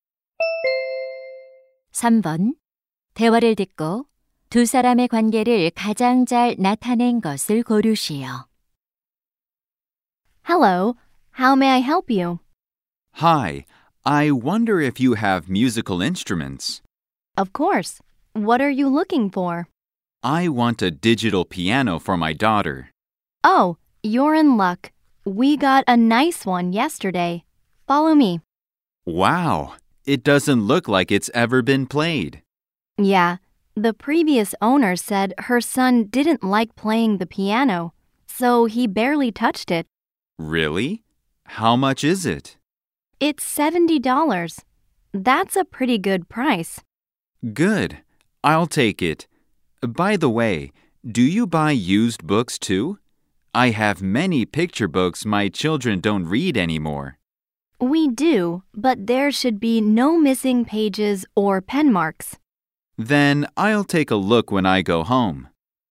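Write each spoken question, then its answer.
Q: 대화를 듣고 두 사람의 관계를 가장 잘 나타낸 것을 고르시오.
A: 중고 물품 가게 점원 - 손님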